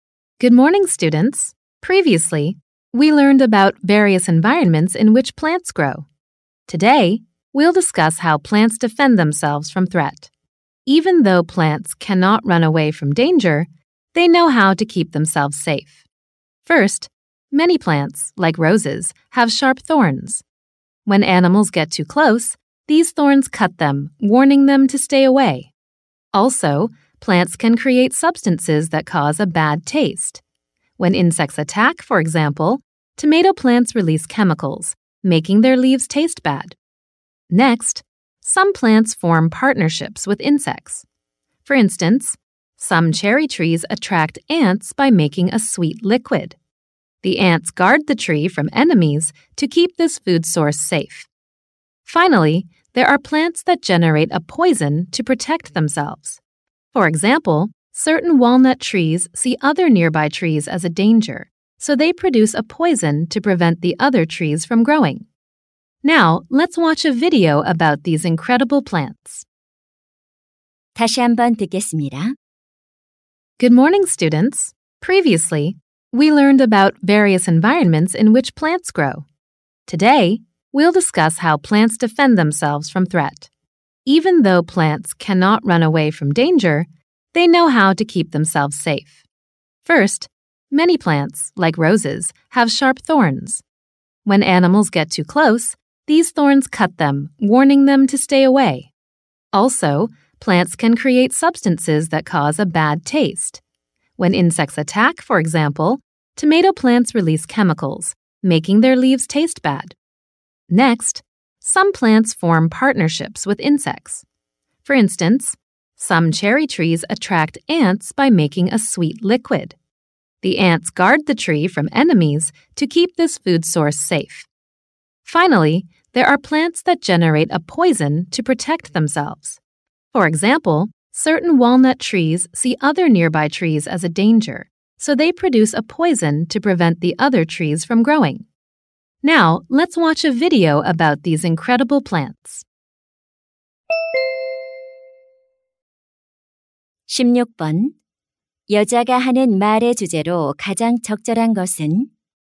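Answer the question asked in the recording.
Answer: 식물이 위협으로부터 스스로를 방어하는 방법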